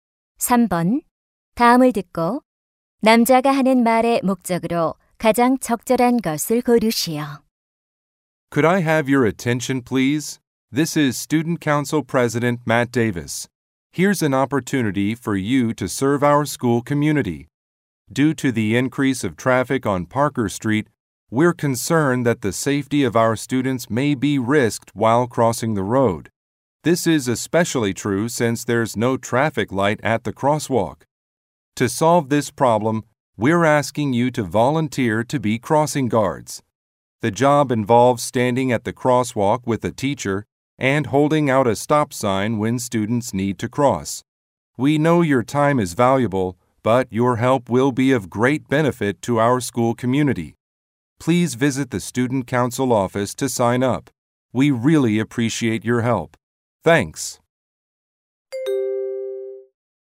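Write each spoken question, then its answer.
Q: 다음을 듣고 남자가 하는 말의 목적으로 가장 적절한 것을 고르시오.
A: 교통 안전 지도 자원봉사자를 모집하려고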